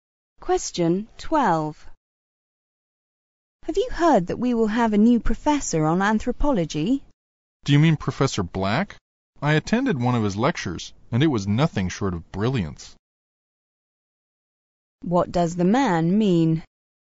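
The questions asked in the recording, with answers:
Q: What does the man mean?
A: Professor Black is a brilliant lecturer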